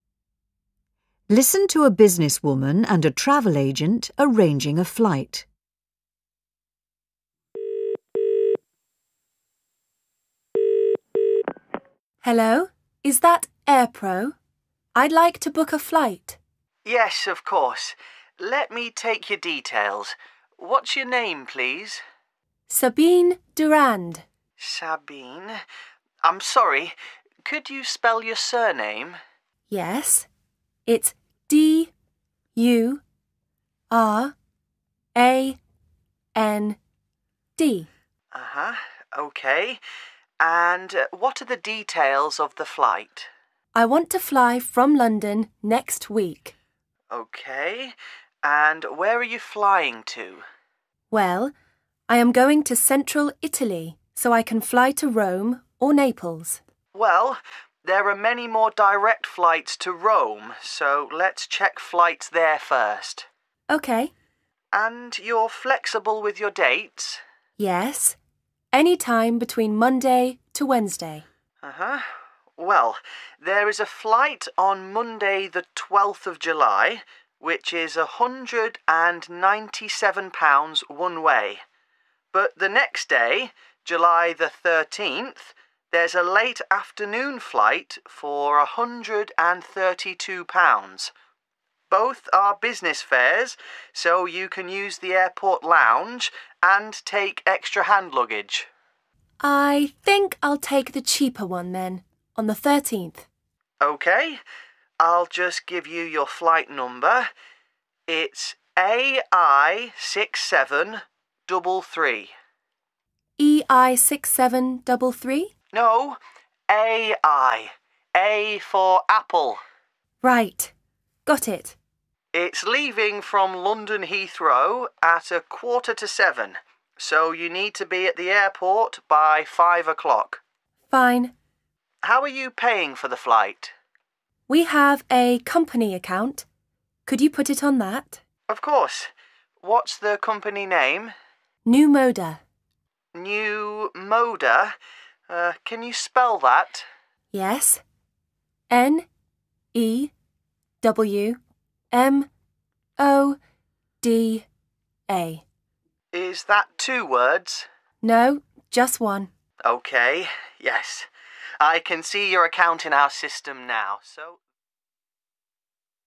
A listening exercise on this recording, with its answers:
3. Listen to a businesswoman and a travel agent arranging a flight. Fill in the information in the numbered space using a word, number or letters.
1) Customer name: (1) Sabine .................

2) Departure city: (2).................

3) Arrival city: (3).................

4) Departure date: (4).................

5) Flight number: (5).................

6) Departure time: (6).................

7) Company name: (7).................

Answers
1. Durand
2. London
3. Rome
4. 13/07 (13th July)
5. AI6733
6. 6.45 / quarter to seven
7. Newmoda